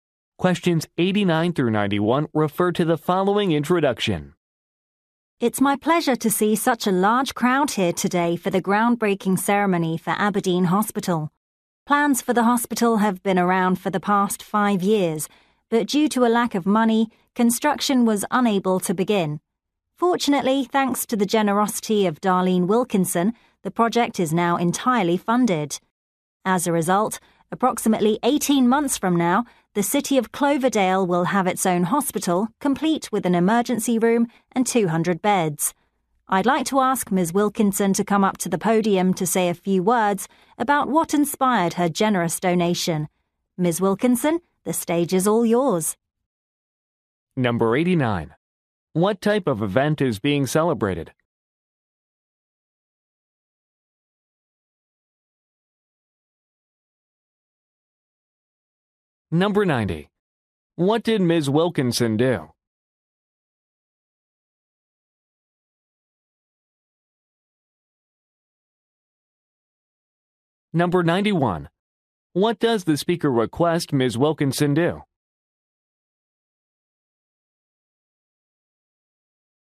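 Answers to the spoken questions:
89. A groundbreaking ceremony for a hospital
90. She funded the hospital project with a donation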